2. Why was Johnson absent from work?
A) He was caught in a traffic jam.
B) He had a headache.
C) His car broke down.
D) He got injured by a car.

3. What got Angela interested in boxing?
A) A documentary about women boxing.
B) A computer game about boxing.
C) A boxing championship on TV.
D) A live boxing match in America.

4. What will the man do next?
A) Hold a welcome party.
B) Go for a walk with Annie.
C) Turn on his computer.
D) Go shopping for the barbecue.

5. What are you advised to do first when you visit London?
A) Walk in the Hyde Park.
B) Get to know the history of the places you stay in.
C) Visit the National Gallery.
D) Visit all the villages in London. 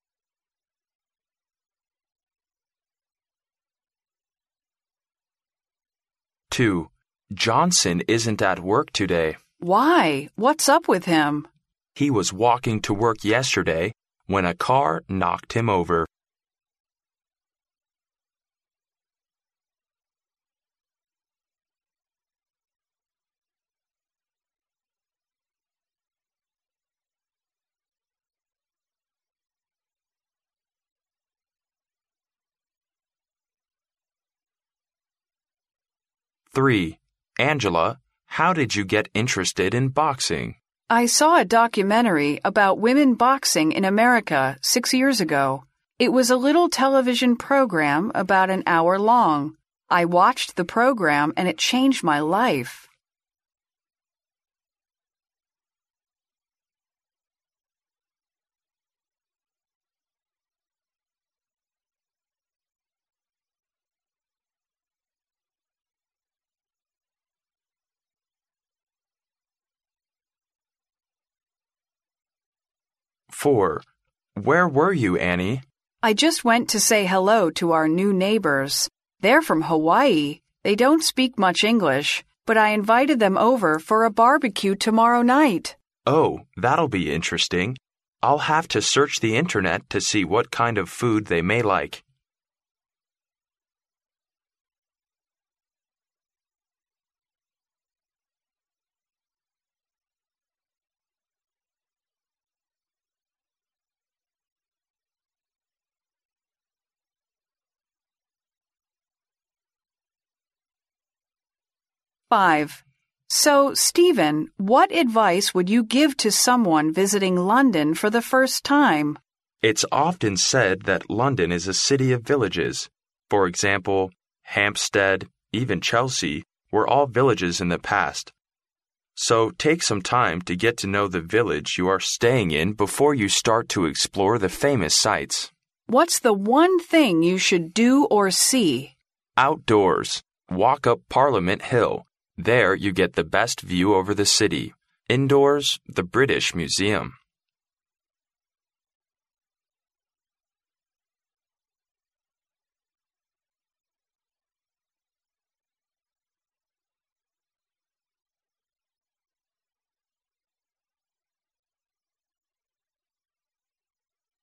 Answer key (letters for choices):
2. D
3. A
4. C
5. B

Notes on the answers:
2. 录音中女士提到"He was walking to work yesterday when a car knocked him over.",可知,Johnson没有来上班是因为昨天被车撞了,故答案为D项。
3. 录音中Angela提到她六年前看了一个关于女子拳击的电视节目,从而对拳击产生了兴趣,因此A项正确。
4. 录音最后男士提到"I will have to search the Internet to see what kind of food they may like.",所以他将要上网搜索他们可能喜欢的食物,由此可知,接下来男士要打开电脑,故选C项。